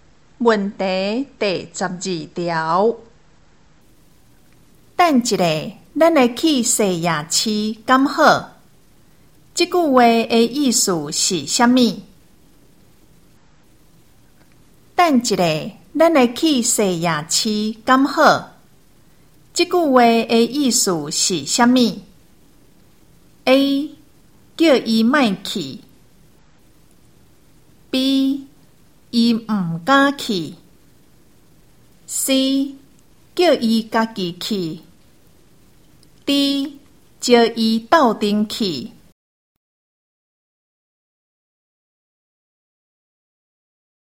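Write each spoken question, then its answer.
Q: 这句话的意思是什么?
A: D: 叫伊斗阵去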